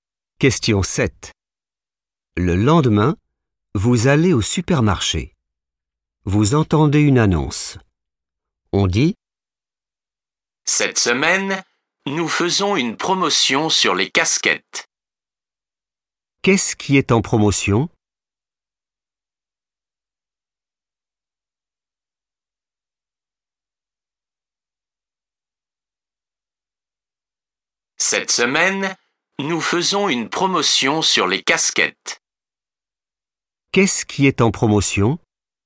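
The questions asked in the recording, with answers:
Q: Qu'est-ce qui est en promotion?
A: les casquettes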